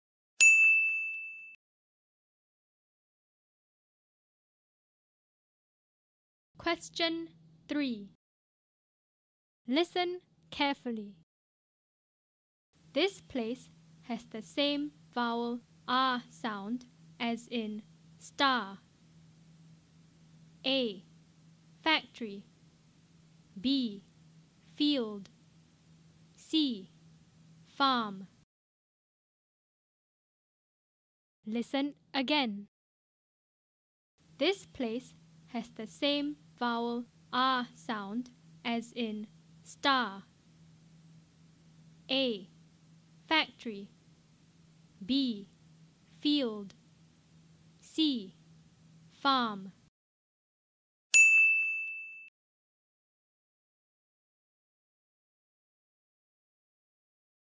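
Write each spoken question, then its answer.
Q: This place has the same vowel R sound as in star.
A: C: Farm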